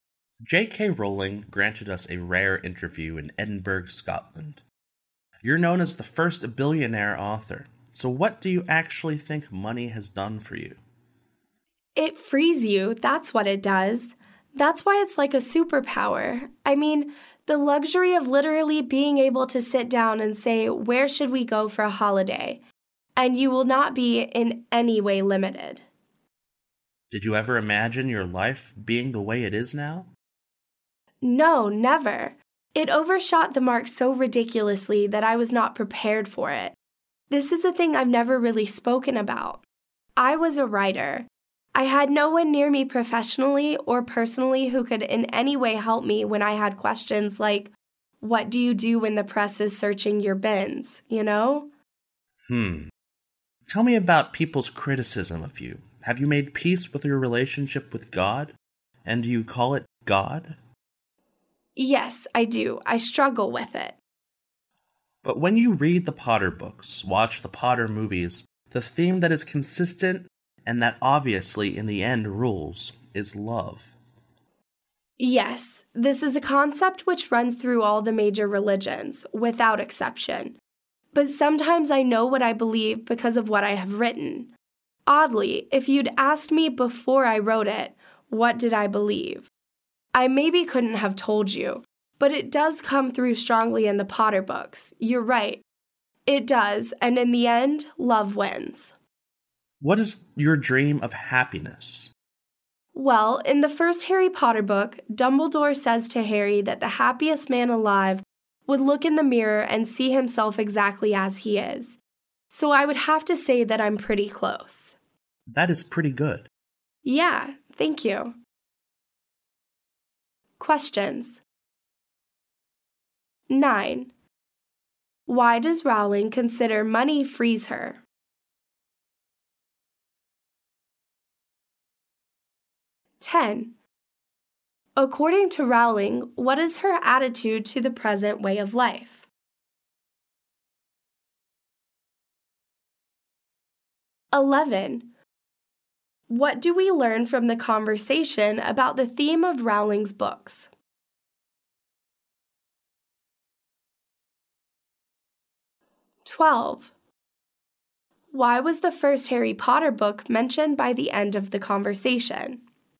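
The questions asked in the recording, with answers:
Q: Why does Rowling consider money frees her?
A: It lets her do things without being limited, like a superpower

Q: What do we learn from the conversation about the theme of Rowling's books?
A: The consistent theme is love, and love wins in the end

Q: Why was the first Harry Potter book mentioned by the end of the conversation?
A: To describe her dream of happiness, which she feels she is close to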